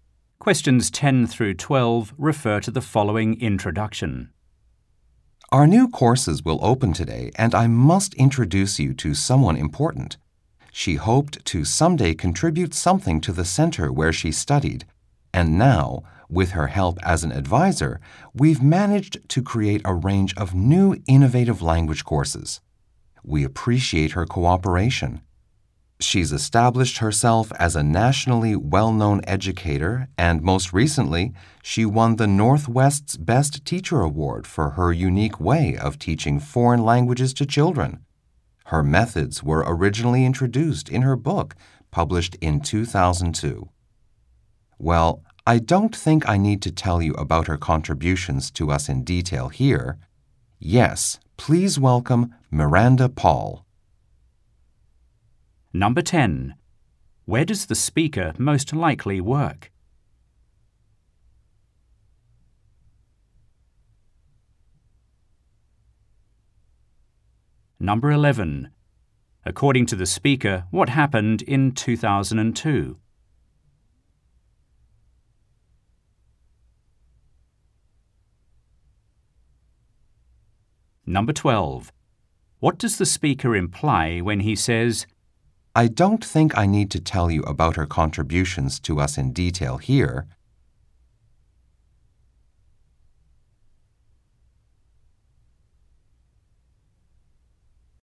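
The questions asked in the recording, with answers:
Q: Where does the speaker most likely work?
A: At a language school (learning center)

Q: According to the speaker, what happened in 2002?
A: Miranda Paul's book introducing her methods was published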